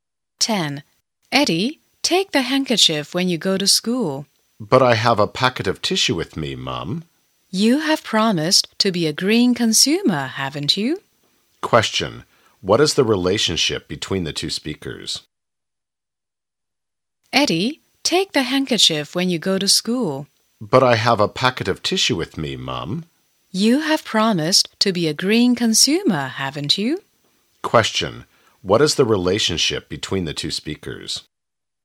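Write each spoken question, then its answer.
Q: what is the relationship between the two speakers?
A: Mother and son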